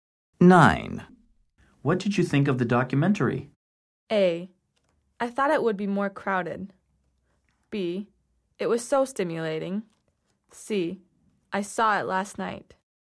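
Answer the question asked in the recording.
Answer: B: It was so stimulating.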